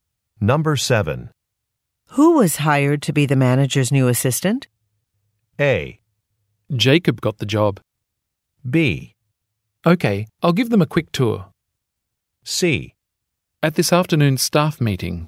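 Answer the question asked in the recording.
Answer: A: Jacob got the job.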